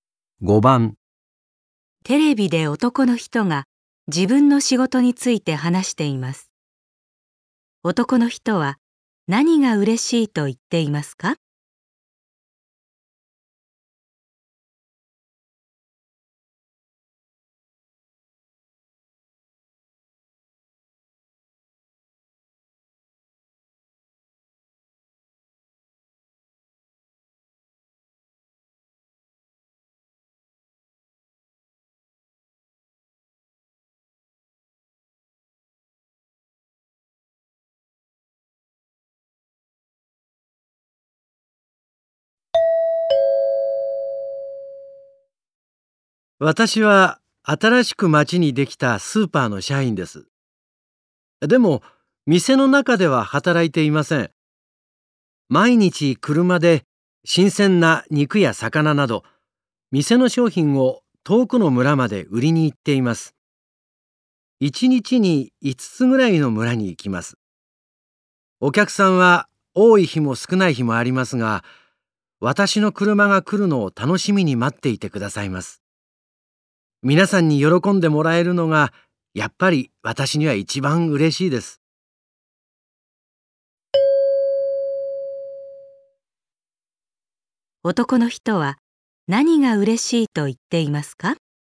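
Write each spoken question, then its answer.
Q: 男の人は何が嬉しいと言っていますか?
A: みんなに喜んでもらえること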